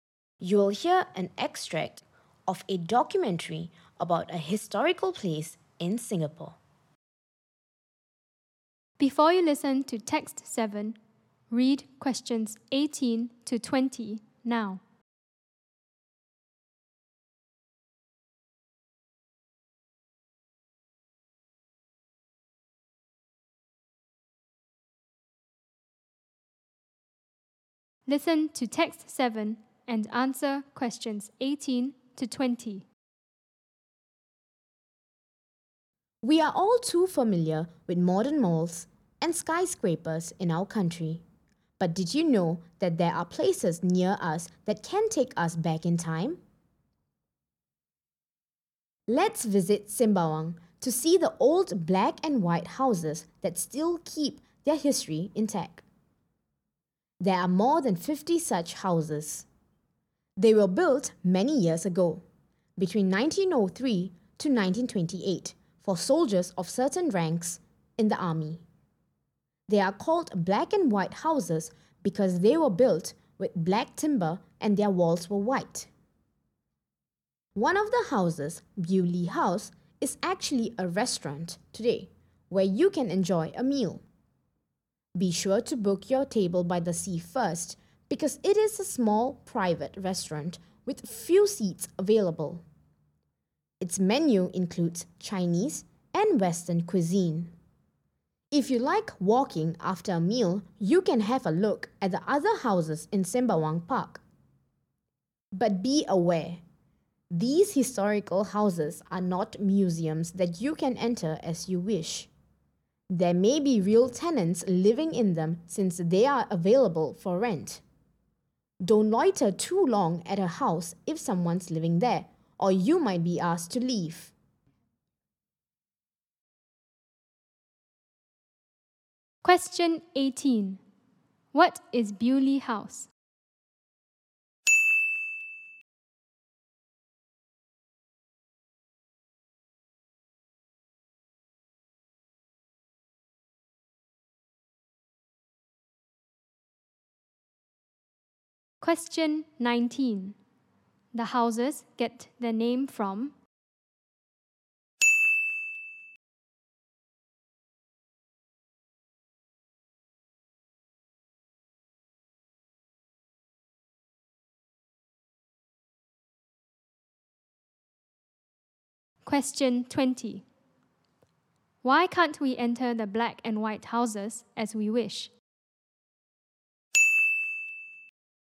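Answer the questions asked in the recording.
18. A small private restaurant
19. Their black timber and white walls
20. Real tenants may be living in them since they are rented out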